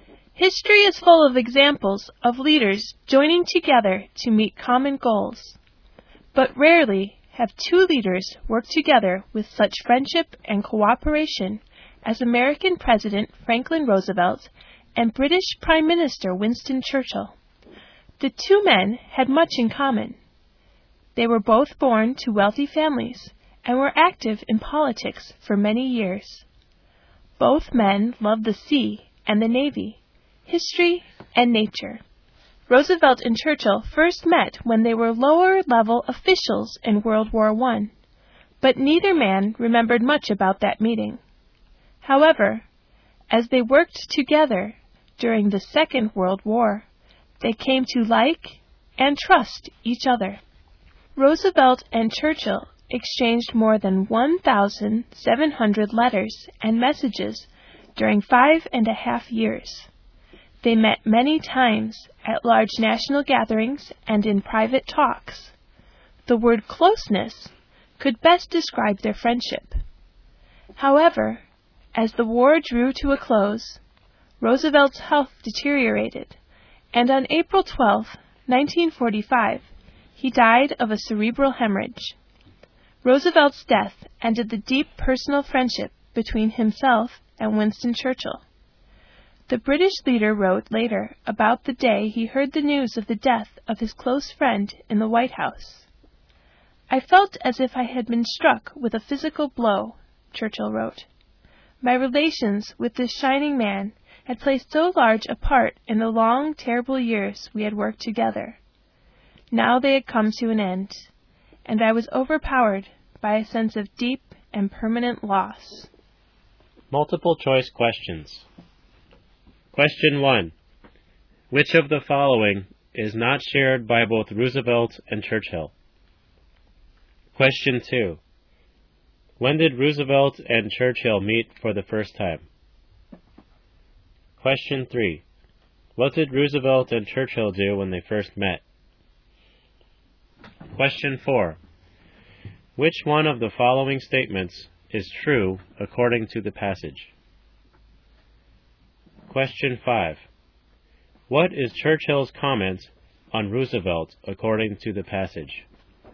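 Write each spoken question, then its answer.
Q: When did Roosevelt and Churchill meet for the first time?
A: During World War I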